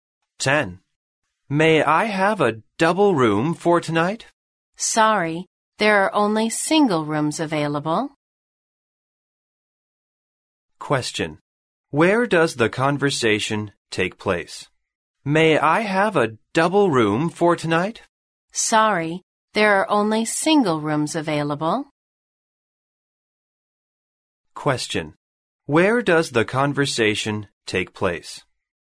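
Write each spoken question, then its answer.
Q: Where does the conversation take place?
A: In a hotel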